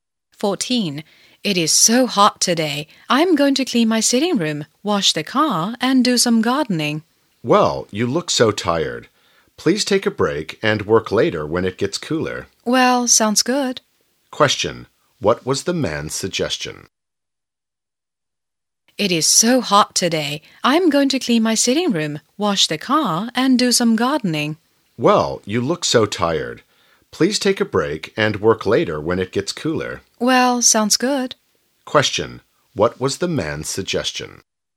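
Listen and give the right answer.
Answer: Take a break and work later when it gets cooler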